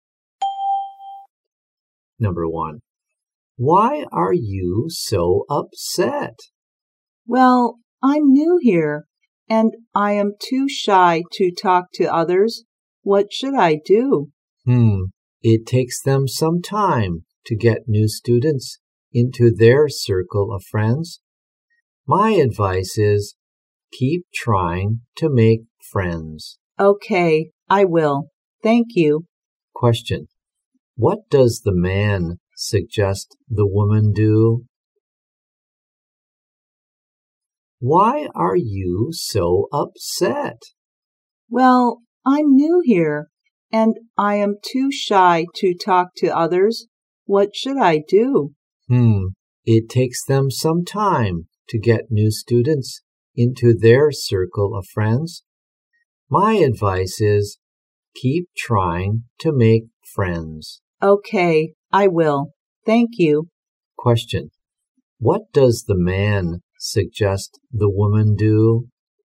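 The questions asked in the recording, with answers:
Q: What does the man suggest the woman do?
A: Keep trying to make friends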